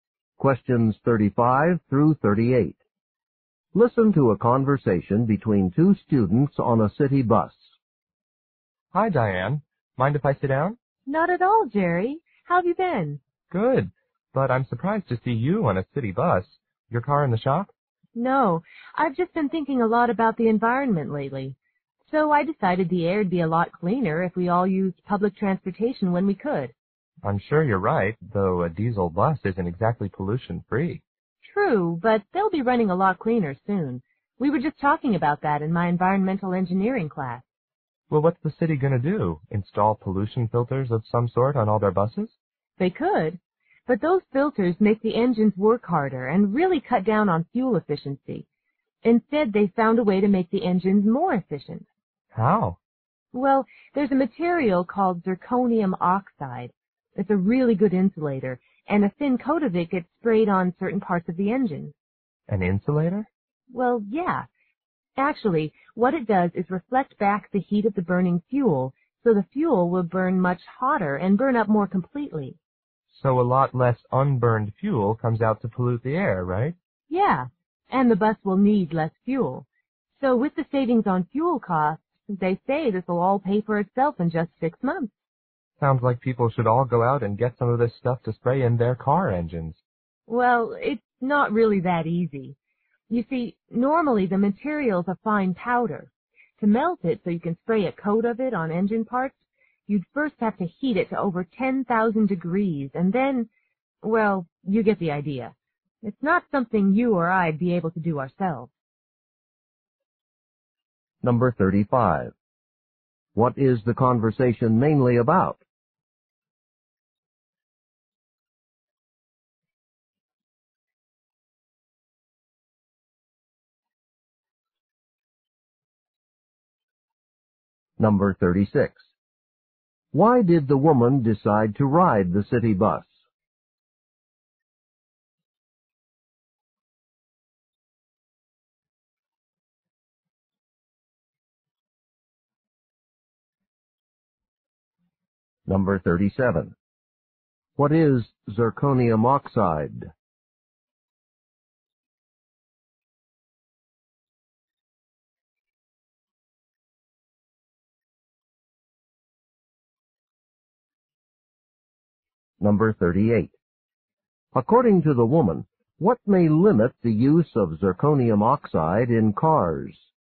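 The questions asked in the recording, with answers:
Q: What is the conversation mainly about?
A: A way to make bus engines cleaner and more efficient

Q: Why did the woman decide to ride the city bus?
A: To help reduce air pollution

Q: What is zirconium oxide?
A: An insulating material sprayed on engine parts

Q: According to the woman, what may limit the use of zirconium oxide in cars?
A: It must be heated to over 10,000 degrees to be applied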